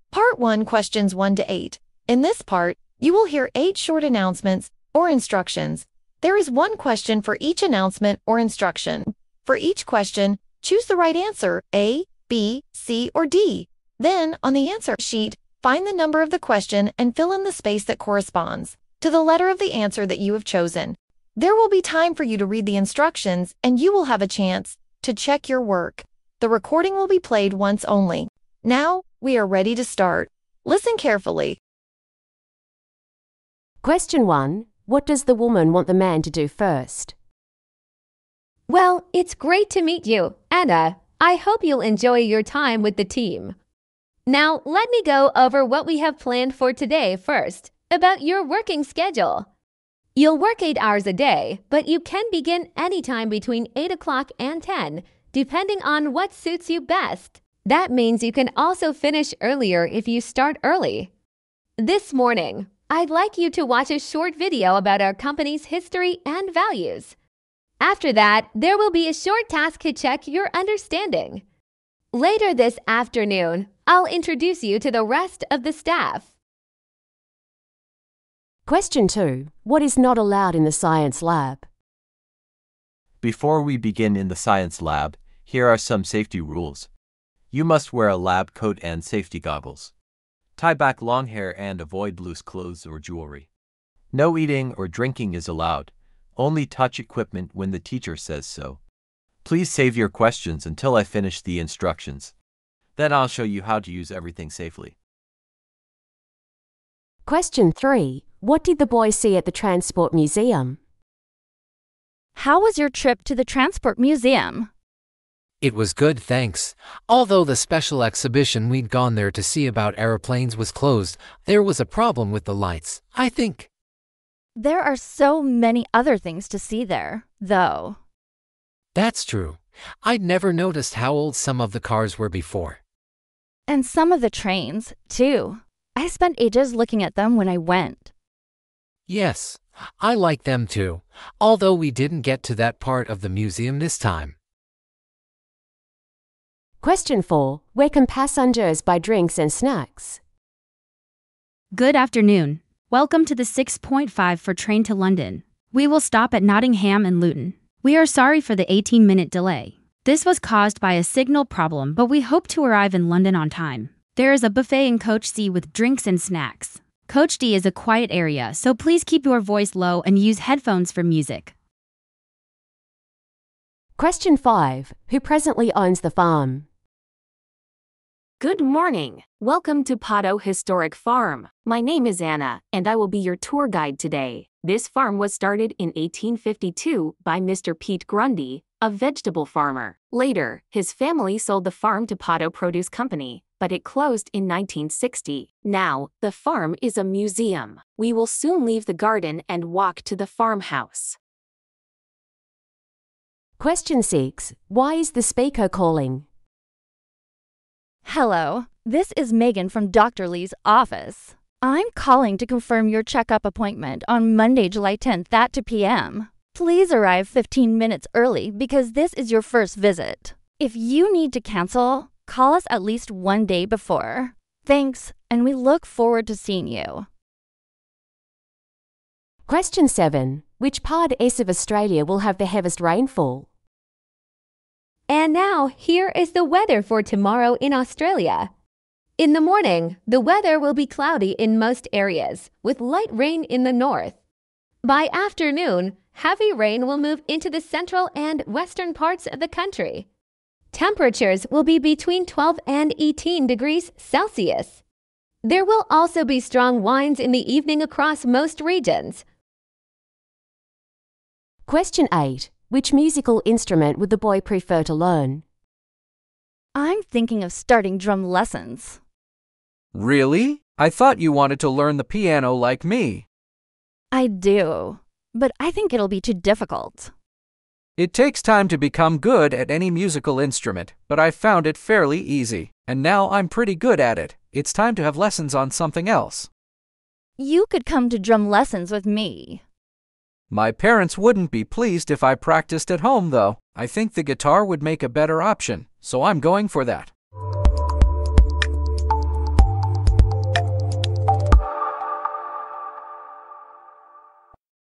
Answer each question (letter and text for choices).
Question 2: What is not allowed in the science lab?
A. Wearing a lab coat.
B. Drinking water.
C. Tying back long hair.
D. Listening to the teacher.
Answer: B. Drinking water.

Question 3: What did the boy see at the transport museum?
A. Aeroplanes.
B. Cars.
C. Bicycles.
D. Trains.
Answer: B. Cars.

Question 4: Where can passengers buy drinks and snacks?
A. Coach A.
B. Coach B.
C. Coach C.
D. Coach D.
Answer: C. Coach C.

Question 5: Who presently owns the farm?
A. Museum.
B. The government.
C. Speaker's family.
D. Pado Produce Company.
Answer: A. Museum.

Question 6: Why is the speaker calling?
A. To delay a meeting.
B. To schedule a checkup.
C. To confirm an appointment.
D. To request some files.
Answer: C. To confirm an appointment.

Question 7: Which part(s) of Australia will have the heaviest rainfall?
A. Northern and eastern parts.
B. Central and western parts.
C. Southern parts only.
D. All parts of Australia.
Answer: B. Central and western parts.

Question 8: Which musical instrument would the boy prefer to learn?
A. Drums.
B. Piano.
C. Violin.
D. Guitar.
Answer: D. Guitar.

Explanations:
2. Thông tin: No eating or drinking is allowed. (Không được phép ăn uống.)
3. Thông tin: I'd never noticed how old some of the cars were before. (Tôi chưa bao giờ để ý thấy một số chiếc xe cũ đến thế trước đây.)
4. Thông tin: There is a buffet in coach C with drinks and snacks. (Có một quầy buffet ở toa C với đồ uống và đồ ăn nhẹ.)
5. Thông tin: Now, the farm is a museum. (Hiện nay, trang trại là một bảo tàng.)
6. Thông tin: I'm calling to confirm your checkup appointment on Monday, July 10 at 2:00 p.m. (Tôi gọi để xác nhận lịch hẹn khám bệnh của bạn vào thứ Hai, ngày 10 tháng 7 lúc 2:00 chiều.)
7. Thông tin: By afternoon, heavy rain will move into the central and western parts of the country. (Đến buổi chiều, mưa lớn sẽ di chuyển vào các phần trung tâm và phía tây đất nước.)
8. Thông tin: I think the guitar would make a better option, so I'm going for that. (Tôi nghĩ đàn guitar sẽ là lựa chọn tốt hơn, vì vậy tôi sẽ chọn nó.)